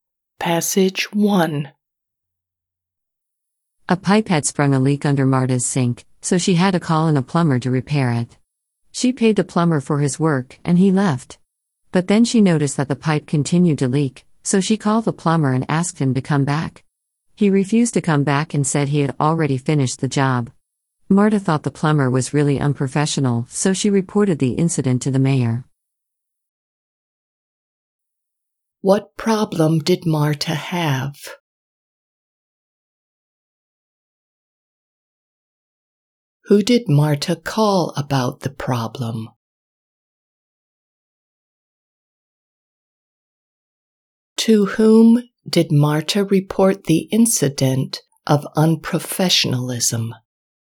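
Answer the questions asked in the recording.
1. A leaking pipe under her sink
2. A plumber
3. The mayor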